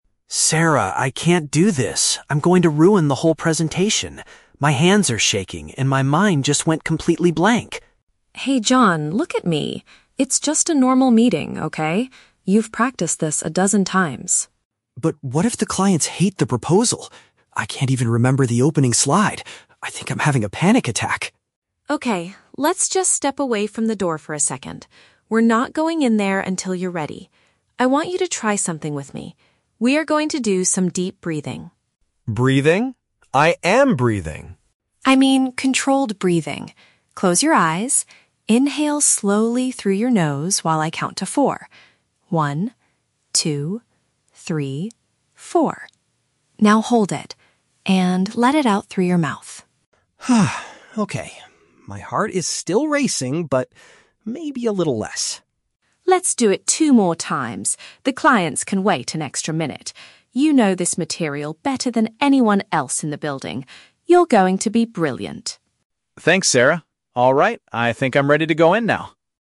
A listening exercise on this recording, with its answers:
Listen to a conversation between two colleagues before a presentation. Choose the correct answer (A, B, or C) for each question.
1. Why is John experiencing a panic attack?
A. He forgot to prepare the opening slide for the meeting.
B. He is afraid that the customers will dislike their business idea.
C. He feels physically ill because he drank too much coffee.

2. What is the first thing Sarah asks John to do to calm down?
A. Move away from the entrance of the meeting room.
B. Drink a glass of water while counting to four.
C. Review the presentation material one more time.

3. How does John feel immediately after doing the breathing exercise?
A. He feels completely relaxed and excited to speak.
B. He wants to cancel the meeting and go back home.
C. His heartbeat is slightly slower, though still fast.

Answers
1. B. He is afraid that the customers will dislike their business idea.
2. A. Move away from the entrance of the meeting room.
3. C. His heartbeat is slightly slower, though still fast.

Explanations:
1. The Key: John says, "what if the clients hate the proposal?" This is paraphrased perfectly as "afraid that the customers will dislike their business idea." The Trap (A): The "opening slide" is mentioned, but John says he can't remember it because of his panic, not that he forgot to prepare it (Mentioned but wrong context). Plausible Trap (C): Shaking hands and a racing heart can be caused by too much coffee, making this a plausible real-world guess, but it is never mentioned in the audio.
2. The Key: Sarah tells John to "step away from the door for a second" before they start the breathing exercise. This matches "Move away from the entrance of the meeting room." The Trap (B): "Counting to four" is mentioned, but it is for his breathing rhythm, not for drinking water (Mentioned but wrong context). The Trap (C): Sarah mentions that he knows the "material" very well, but she never tells him to read or review it again (Mentioned but rejected).
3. The Key: John says his "heart is still racing, but maybe a little less." This perfectly matches the description that his "heartbeat is slightly slower, though still fast." The Trap (A): John feels a bit better and eventually agrees to go in, but he is certainly not "completely relaxed and excited" (Too extreme/False). Plausible Trap (B): Wanting to go home is a very common reaction to a panic attack, but John never suggests canceling the meeting after Sarah helps him.

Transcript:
John: Sarah, I can't do this. I'm going to ruin the whole presentation. My hands are shaking, and my mind just went completely blank!
Sarah: Hey, John, look at me. It's just a normal meeting, okay? You've practiced this a dozen times.
John: But what if the clients hate the proposal? I... I can't even remember the opening slide. I think I'm having a panic attack.
Sarah: Okay, let's just step away from the door for a second. We're not going in there until you're ready. I want you to try something with me. We are going to do some deep breathing.
John: Breathing? I am breathing!
Sarah: I mean controlled breathing. Close your eyes. Inhale slowly through your nose while I count to four. Now hold it... and let it out through your mouth.
John: Okay... my heart is still racing, but maybe a little less.
Sarah: Let's do it two more times. The clients can wait an extra minute. You know this material better than anyone else in the building. You're going to be brilliant.
John: Thanks, Sarah. Alright. I think I'm ready to go in now.

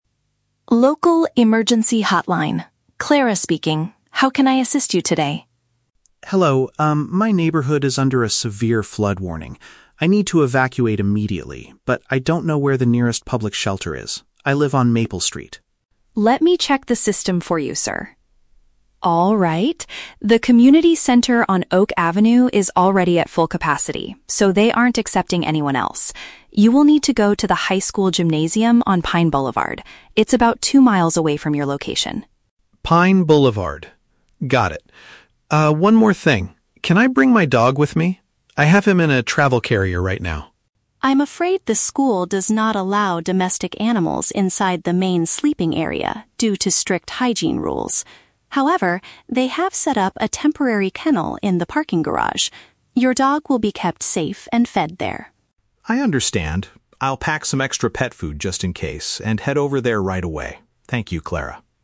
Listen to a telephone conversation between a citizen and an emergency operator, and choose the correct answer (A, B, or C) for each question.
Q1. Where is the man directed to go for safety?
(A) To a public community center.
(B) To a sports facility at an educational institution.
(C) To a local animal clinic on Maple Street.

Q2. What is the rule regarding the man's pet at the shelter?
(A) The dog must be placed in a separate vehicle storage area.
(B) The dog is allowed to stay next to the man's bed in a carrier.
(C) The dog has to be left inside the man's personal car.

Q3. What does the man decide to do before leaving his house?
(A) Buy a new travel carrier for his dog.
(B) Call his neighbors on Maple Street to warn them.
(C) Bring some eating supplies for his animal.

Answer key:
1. (B) To a sports facility at an educational institution.
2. (A) The dog must be placed in a separate vehicle storage area.
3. (C) Bring some eating supplies for his animal.

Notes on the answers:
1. The operator tells the man to go to the "high school gymnasium". "Sports facility" is a paraphrase of gymnasium, and "educational institution" is a synonym for high school.
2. The operator states that the dog will be kept in a "temporary kennel in the parking garage". "Separate vehicle storage area" is a paraphrase of a parking garage.
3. Before hanging up, the man says, "I'll pack some extra pet food". "Eating supplies for his animal" is a paraphrase of packing pet food.

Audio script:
Operator: Local Emergency Hotline. Clara speaking. How can I assist you today?
Citizen: Hello. Um, my neighborhood is under a severe flood warning. I need to evacuate immediately, but I don't know where the nearest public shelter is. I live on Maple Street.
Operator: Let me check the system for you, sir. The community center on Oak Avenue is already at full capacity, so they aren't accepting anyone else. You will need to go to the high school gymnasium on Pine Boulevard. It's about two miles away from your location.
Citizen: Pine Boulevard. Got it. Ah, one more thing. Can I bring my dog with me? I have him in a travel carrier right now.
Operator: I'm afraid the school does not allow domestic animals inside the main sleeping area due to strict hygiene rules. However, they have set up a temporary kennel in the parking garage. Your dog will be kept safe and fed there.
Citizen: I understand. I'll pack some extra pet food just in case and head over there right away. Thank you, Clara.

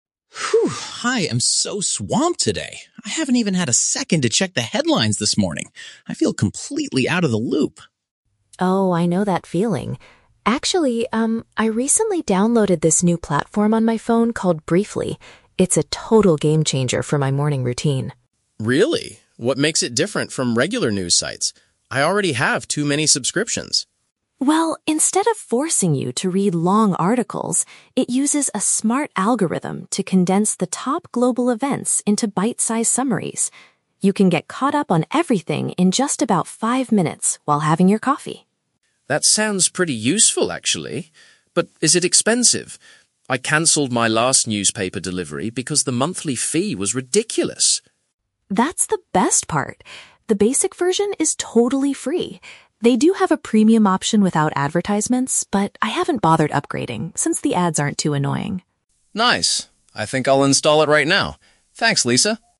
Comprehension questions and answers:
Listen to a conversation between two colleagues. Choose the correct answer (A, B, or C) for each question.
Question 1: Why does the man feel "out of the loop"?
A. He has been too busy to read the daily news.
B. He canceled all of his digital magazine subscriptions.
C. His internet connection at the office is not working.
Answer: A. He has been too busy to read the daily news.

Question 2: What is the main feature of the "Briefly" app?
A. It reads the morning headlines aloud while users drink coffee.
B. It provides lengthy, in-depth reports on global events.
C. It creates short summaries of the most important stories.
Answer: C. It creates short summaries of the most important stories.

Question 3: Why does the woman use the free version of the application?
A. She cannot afford to pay the expensive monthly price.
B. She thinks the commercial interruptions are acceptable.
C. The premium upgrade is currently unavailable on her phone.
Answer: B. She thinks the commercial interruptions are acceptable.

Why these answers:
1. Mark says he is "swamped" (very busy) and hasn't had a second to "check the headlines". Option A paraphrases this perfectly. Option B is the Trap: He did cancel a newspaper delivery, but that is not the reason he doesn't know the news today. Option C is not mentioned in the audio.
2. Lisa says the app condenses "top global events into bite-sized summaries". Option C uses synonyms ("short summaries", "most important stories") to match this idea. Option A is the Trap: The audio mentions "having your coffee", but the app does not read the news aloud. Option B is the exact opposite of what the app does.
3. Lisa mentions that she hasn't upgraded to the premium version because "the ads aren't too annoying". Option B paraphrases "ads" as "commercial interruptions" and "not too annoying" as "acceptable". Option A is the Trap: Mark is the one who complains about a "ridiculous monthly fee", not Lisa. Option C is plausible but never mentioned.

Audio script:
Mark: Phew, I am so swamped today. I haven't even had a second to check the headlines this morning. I feel completely out of the loop.
Lisa: Oh, I know that feeling. Actually, um, I recently downloaded this new platform on my phone called "Briefly". It's a total game-changer for my morning routine.
Mark: Really? What makes it different from regular news sites? I already have too many subscriptions.
Lisa: Well, instead of forcing you to read long articles, it uses a smart algorithm to condense the top global events into bite-sized summaries. You can get caught up on everything in just about five minutes while having your coffee.
Mark: That sounds pretty useful, actually. But is it expensive? I canceled my last newspaper delivery because the monthly fee was ridiculous.
Lisa: That's the best part! The basic version is totally free. They do have a premium option without advertisements, but I haven't bothered upgrading since the ads aren't too annoying.

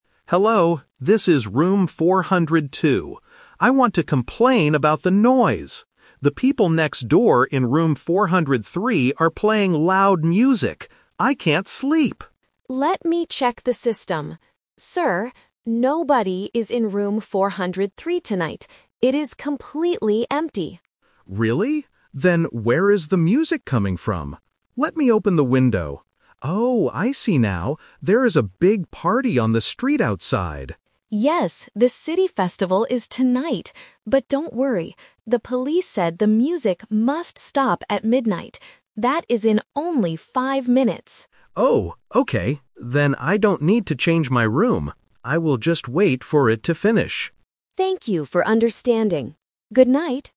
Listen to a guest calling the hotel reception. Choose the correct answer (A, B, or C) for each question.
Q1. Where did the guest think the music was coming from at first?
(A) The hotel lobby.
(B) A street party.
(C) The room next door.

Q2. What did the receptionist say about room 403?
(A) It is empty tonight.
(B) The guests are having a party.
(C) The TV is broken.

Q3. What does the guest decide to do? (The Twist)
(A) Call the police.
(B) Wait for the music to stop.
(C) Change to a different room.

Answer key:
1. (C) The room next door.
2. (A) It is empty tonight.
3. (B) Wait for the music to stop.

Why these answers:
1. At the beginning, the guest complains, "The people next door in room 403 are playing loud music."
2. The receptionist checks the system and says, "Sir, nobody is in room 403 tonight. It is completely empty."
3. This is the Twist. Since the street party ends in five minutes, the guest changes his mind about needing action. He says, "Then I don't need to change my room. I will just wait for it to finish."

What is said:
Guest: Hello, this is room 402. I want to complain about the noise. The people next door in room 403 are playing loud music. I can't sleep!
Receptionist: Let me check the system. Sir, nobody is in room 403 tonight. It is completely empty.
Guest: Really? Then where is the music coming from? Let me open the window... Oh, I see now. There is a big party on the street outside.
Receptionist: Yes, the city festival is tonight. But don't worry, the police said the music must stop at midnight. That is in only five minutes.
Guest: Oh, okay. Then I don't need to change my room.

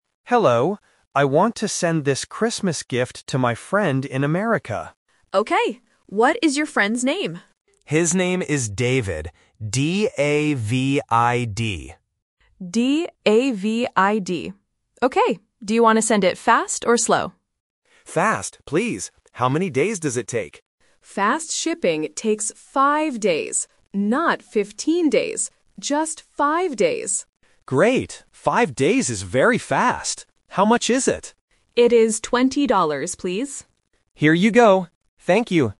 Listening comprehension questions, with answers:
Listen to the conversation and choose the correct answer (A, B, or C).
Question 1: What is the friend's name?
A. David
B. Davis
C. Daniel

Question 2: How many days does the fast shipping take?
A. 5 days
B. 15 days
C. 50 days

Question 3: How much does the customer pay?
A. 10 dollars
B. 12 dollars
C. 20 dollars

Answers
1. A. David
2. A. 5 days
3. C. 20 dollars

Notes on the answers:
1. The customer spells the name clearly: "D-A-V-I-D."
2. The clerk says, "Fast shipping takes 5 days," and the customer repeats, "5 days is very fast."
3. The clerk clearly says, "It is 20 dollars, please."

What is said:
Customer: Hello. I want to send this Christmas gift to my friend in America.
Clerk: Okay. What is your friend's name?
Customer: His name is David. D-A-V-I-D.
Clerk: D-A-V-I-D. Okay. Do you want to send it fast or slow?
Customer: Fast, please. How many days does it take?
Clerk: Fast shipping takes 5 days. Not 15 days. Just 5 days.
Customer: Great! 5 days is very fast. How much is it?

